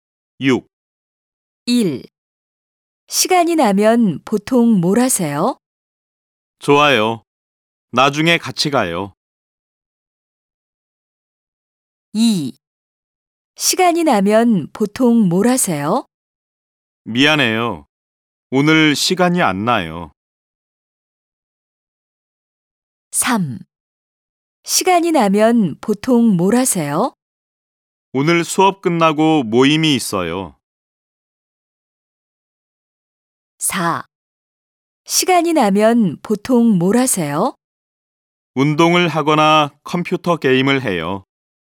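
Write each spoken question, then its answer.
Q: 시간이 나면 보통 뭘 하세요?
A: 4: 운동을 하거나 컴퓨터 게임을 해요.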